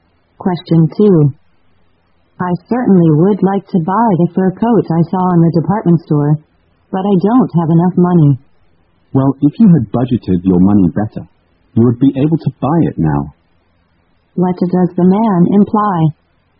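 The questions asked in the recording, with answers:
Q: What does the man imply?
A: The woman didn't budget her money well, so she can't afford the coat.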